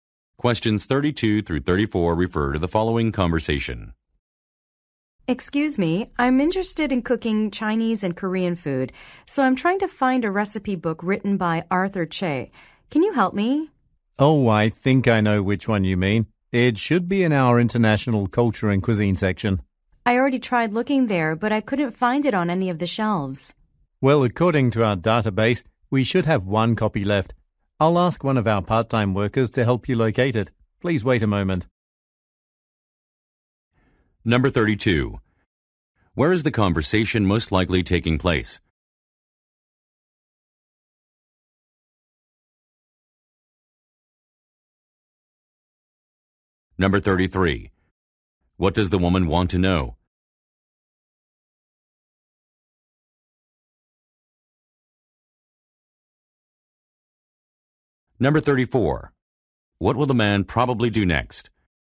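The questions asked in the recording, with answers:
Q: Where is the conversation most likely taking place?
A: At a bookstore or library

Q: What will the man probably do next?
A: Ask a part-time worker to help find the book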